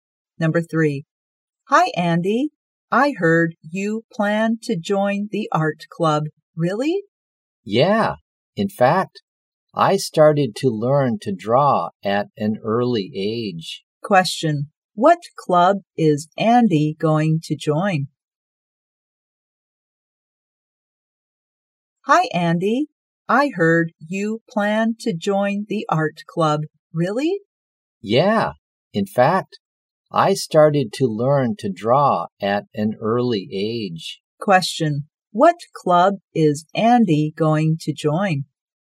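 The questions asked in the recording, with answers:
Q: Question. What club is Andy going to join?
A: The art club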